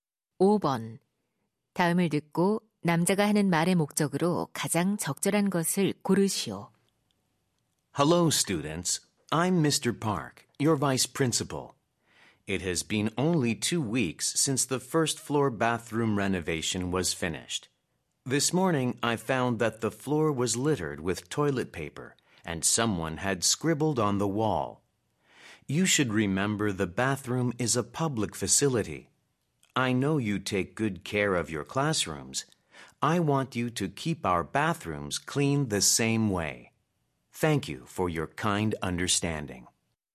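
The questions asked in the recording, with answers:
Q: 다음을 듣고 남자가 하는 말의 목적으로 가장 적절한 것을 고르시오.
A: 학교 화장실을 깨끗하게 사용할 것을 당부하려고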